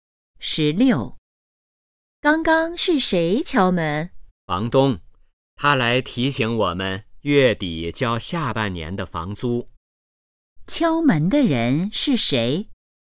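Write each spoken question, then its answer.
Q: 敲门的人是谁?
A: 房东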